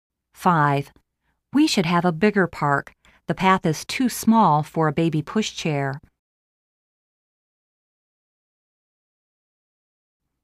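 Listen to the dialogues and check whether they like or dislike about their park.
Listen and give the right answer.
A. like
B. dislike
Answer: B. dislike

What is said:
5.We should have a bigger park. The path is too small for a baby pushchairl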